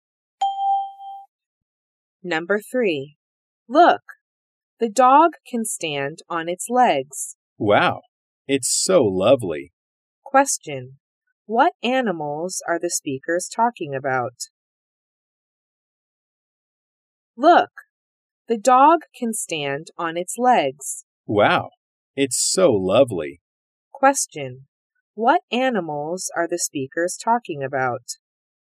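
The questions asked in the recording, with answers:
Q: what animals are the speakers talking about?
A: A dog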